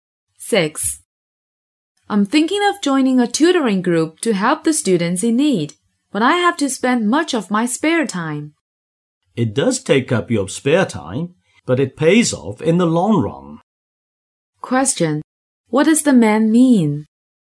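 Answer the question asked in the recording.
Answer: Joining the tutoring group is worth it in the long run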